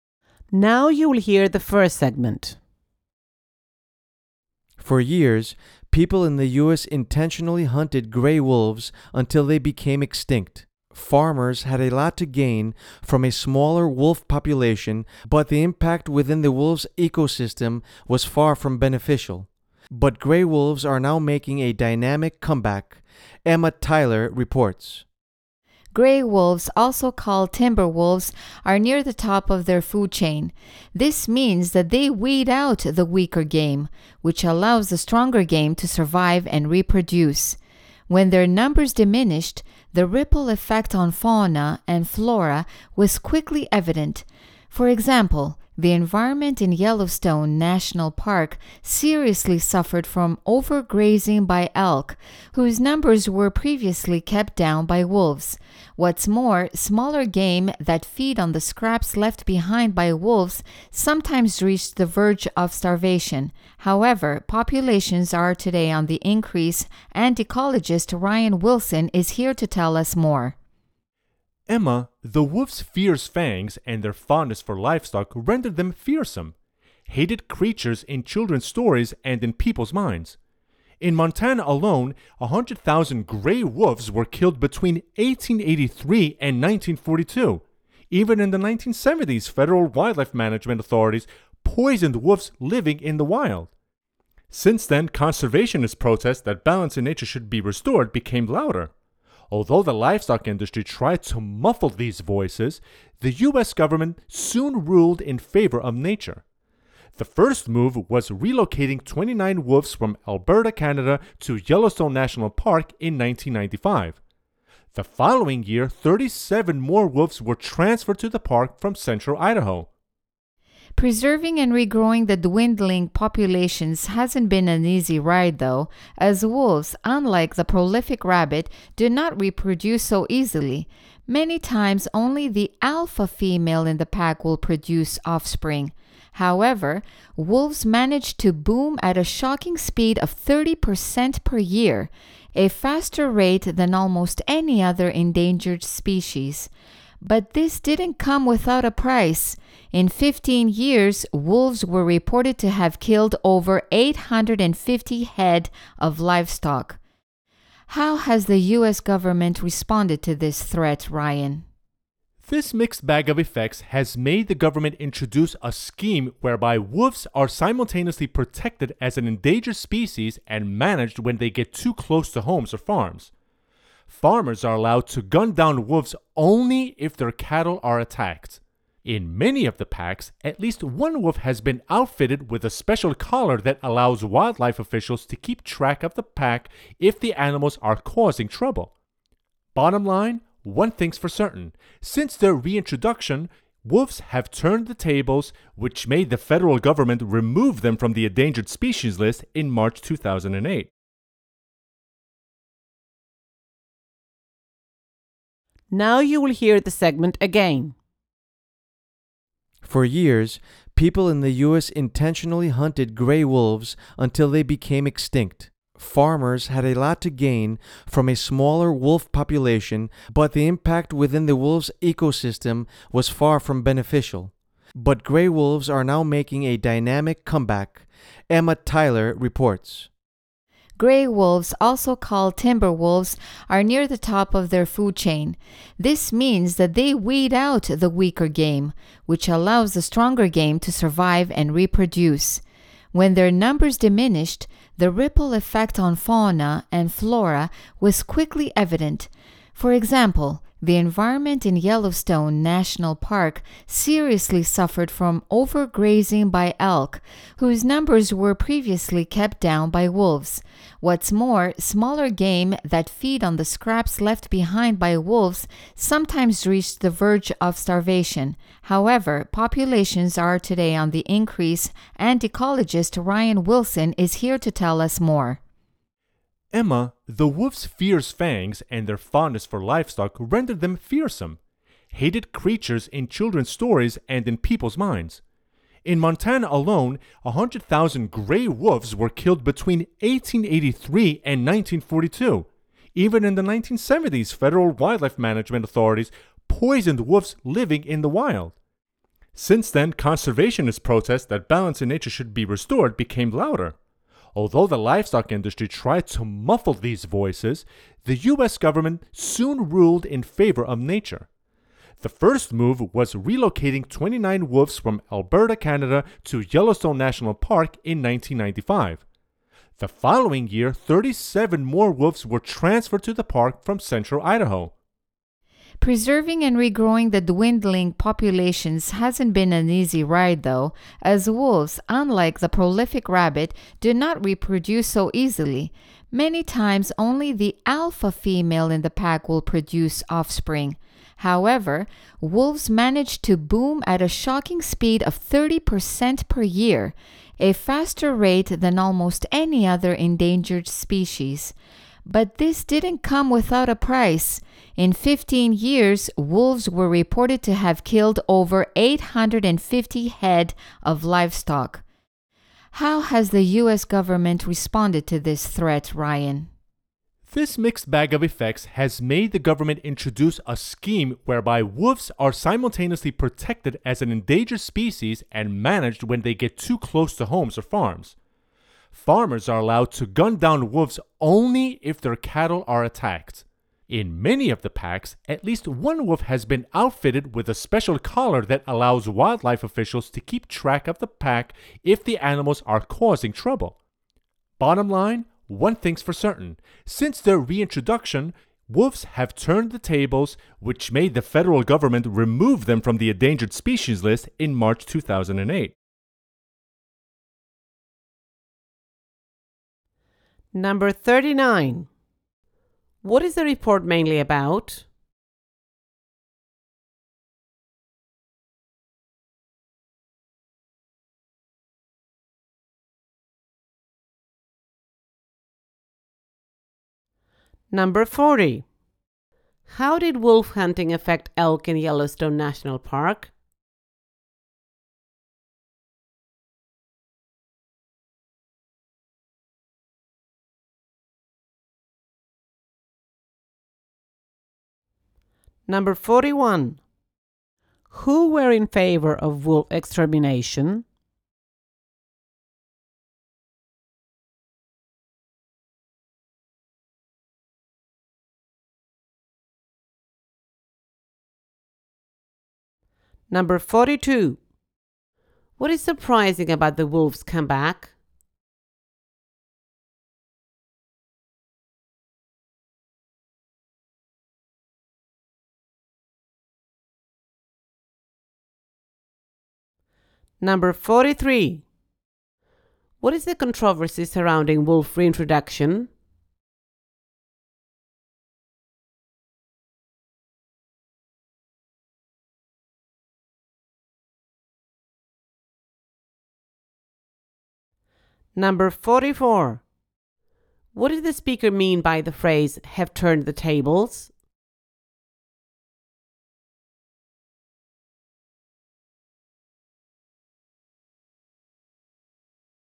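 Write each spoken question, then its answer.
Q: What is the report mainly about?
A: The comeback of gray wolves in the U.S.

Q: How did wolf hunting affect elk in Yellowstone National Park?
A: Elk numbers grew, causing overgrazing

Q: Who were in favor of wolf extermination?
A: Farmers / the livestock industry

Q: What is surprising about the wolves' comeback?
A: Their fast growth, 30% per year, despite slow reproduction

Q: What is the controversy surrounding wolf reintroduction?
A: Wolves kill livestock

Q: What did the speaker mean by the phrase, "have turned the tables"?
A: Wolves have reversed their decline and recovered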